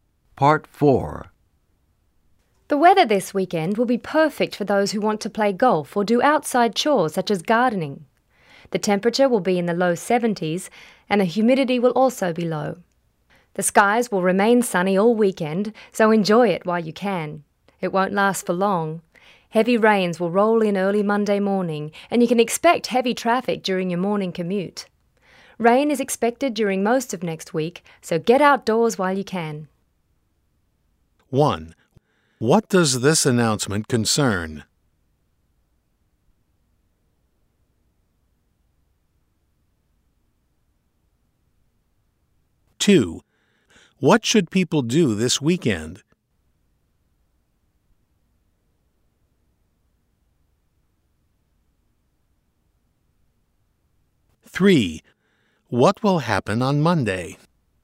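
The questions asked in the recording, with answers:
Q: What does this announcement concern?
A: The weather

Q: What should people do this weekend?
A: Get outdoors, e.g. play golf or garden

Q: What will happen on Monday?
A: Heavy rains will arrive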